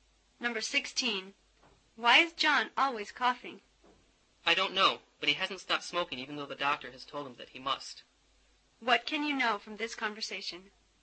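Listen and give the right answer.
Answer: John keeps smoking even though the doctor told him to stop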